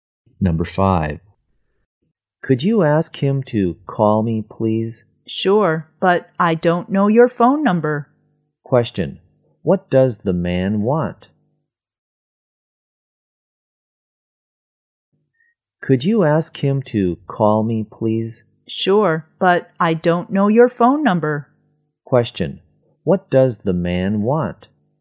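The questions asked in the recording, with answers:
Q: what does the man want?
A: The woman's phone number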